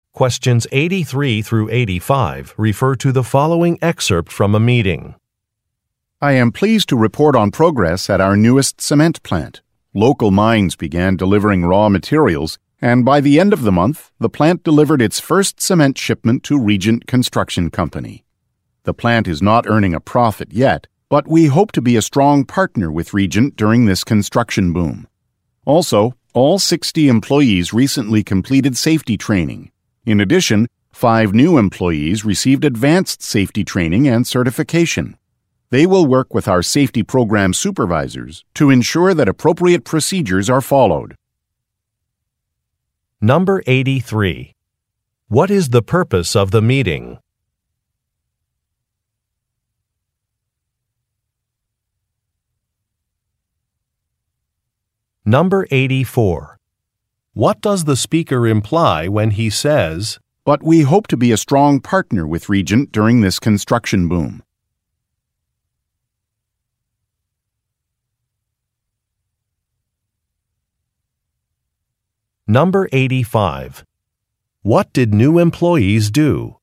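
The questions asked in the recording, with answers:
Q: What is the purpose of the meeting?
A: To report on progress at the new cement plant

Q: What did new employees do?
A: Received advanced safety training and certification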